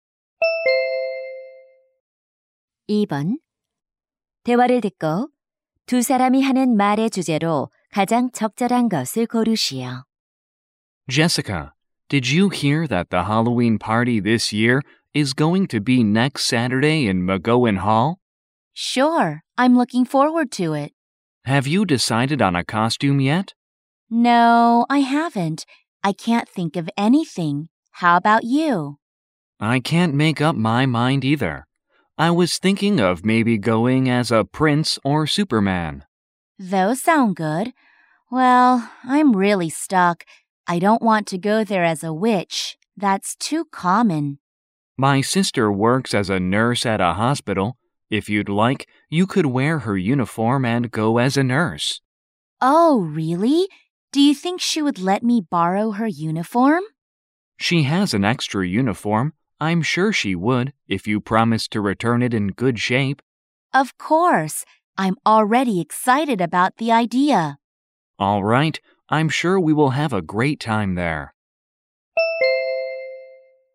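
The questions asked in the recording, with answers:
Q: 대화를 듣고 두 사람이 하는 말의 주제로 가장 적절한 것을 고르시오.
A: 핼러윈 파티 의상 정하기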